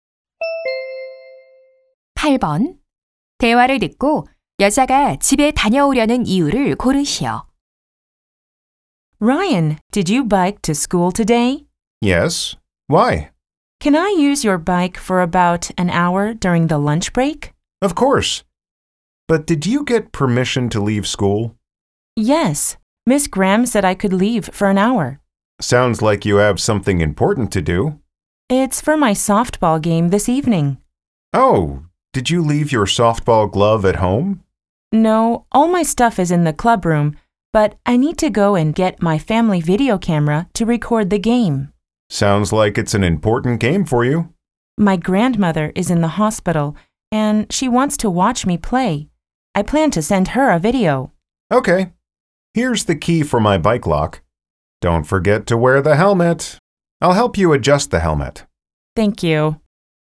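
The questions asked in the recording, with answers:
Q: 대화를 듣고 여자가 집에 다녀오려는 이유를 고르시오.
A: 경기를 녹화할 비디오카메라를 가져오려고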